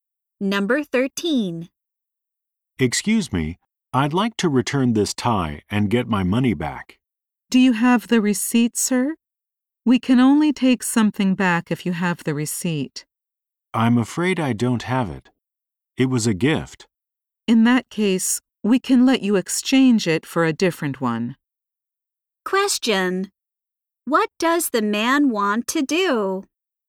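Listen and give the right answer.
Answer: Return a tie and get his money back.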